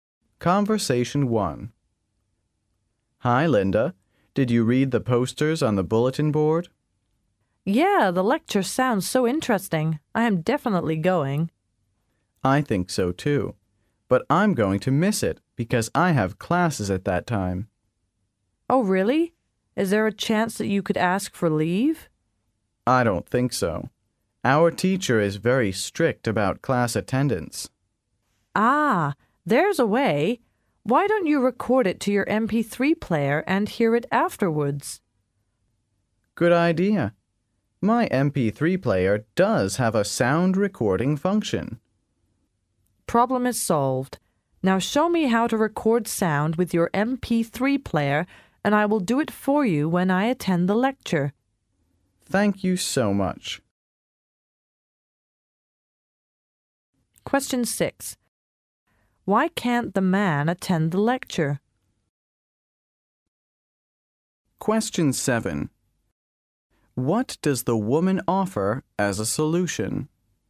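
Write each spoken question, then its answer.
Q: Why can't the man attend the lecture?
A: He has classes at that time

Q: What does the woman offer as a solution?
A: To record the lecture with his MP3 player for him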